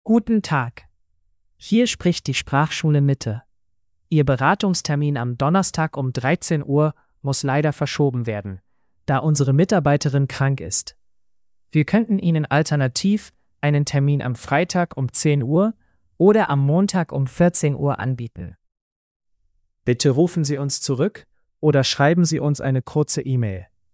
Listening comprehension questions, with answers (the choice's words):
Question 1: Warum wird der Termin verschoben?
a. Die Mitarbeiterin ist krank.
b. Die Schule ist geschlossen.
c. Der Teilnehmer hat keine Zeit.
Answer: Die Mitarbeiterin ist krank.

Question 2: Welche Alternativen werden angeboten?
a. Freitag 10 Uhr oder Montag 14 Uhr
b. Donnerstag 13 Uhr oder Freitag 14 Uhr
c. Montag 10 Uhr oder Dienstag 13 Uhr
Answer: Freitag 10 Uhr oder Montag 14 Uhr

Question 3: Was soll die Person tun?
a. nichts tun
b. zurückrufen oder eine E-Mail schreiben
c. direkt zur Schule kommen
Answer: zurückrufen oder eine E-Mail schreiben

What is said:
Guten Tag, hier spricht die Sprachschule Mitte. Ihr Beratungstermin am Donnerstag um 13 Uhr muss leider verschoben werden, da unsere Mitarbeiterin krank ist. Wir könnten Ihnen alternativ einen Termin am Freitag um 10 Uhr oder am Montag um 14 Uhr anbieten. Bitte rufen Sie uns zurück oder schreiben Sie uns eine kurze E-Mail.

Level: Road to B2